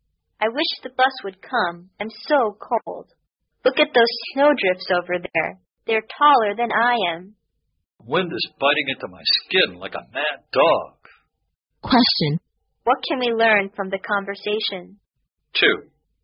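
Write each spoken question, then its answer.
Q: What can we learn from the conversation?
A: It is very cold and snowy while they wait for the bus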